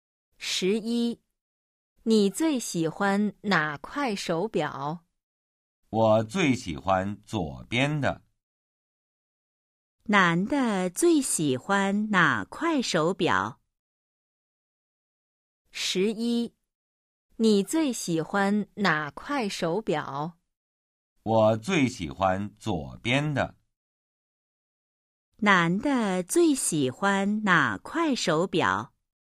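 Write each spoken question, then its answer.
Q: 男的最喜欢哪块手表?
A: 左边的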